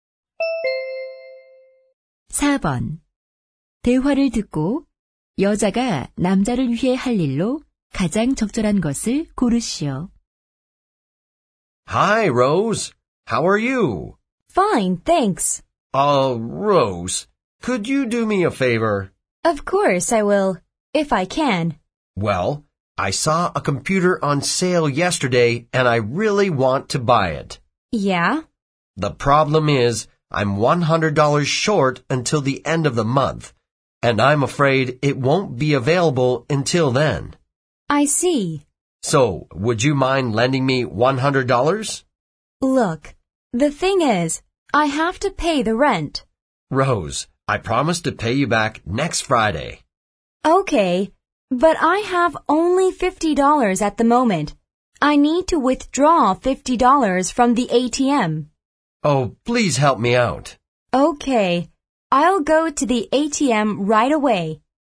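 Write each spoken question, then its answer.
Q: 대화를 듣고 여자가 남자를 위해 할 일로 가장 적절한 것을 고르시오.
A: ATM에서 돈을 인출해 빌려주기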